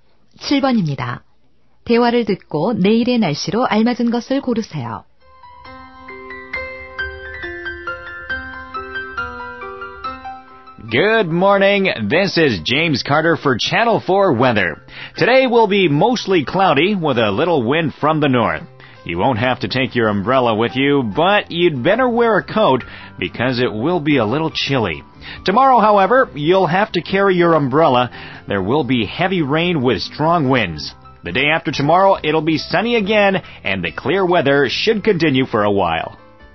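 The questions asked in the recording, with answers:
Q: 대화를 듣고 내일의 날씨로 알맞은 것을 고르세요.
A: 강풍을 동반한 폭우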